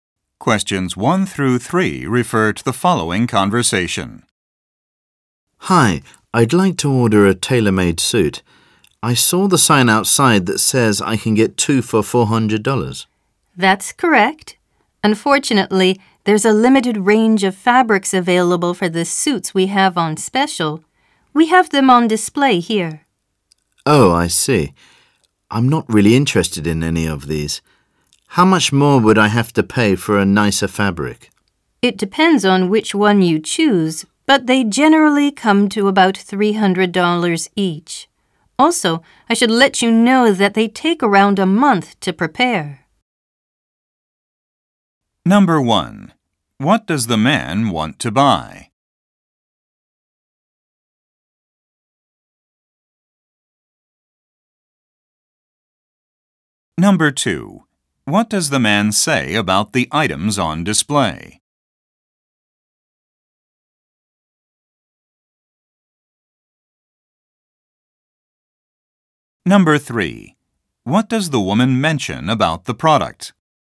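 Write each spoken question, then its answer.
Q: What does the man want to buy?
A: A tailor-made suit

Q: What does the man say about the items on display?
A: He is not interested in them

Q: What does the woman mention about the product?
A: It takes about a month to prepare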